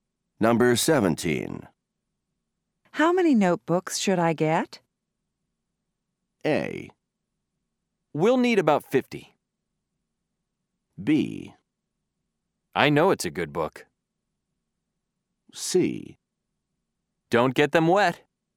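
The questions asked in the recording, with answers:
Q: How many notebooks should I get?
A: A: We'll need about 50.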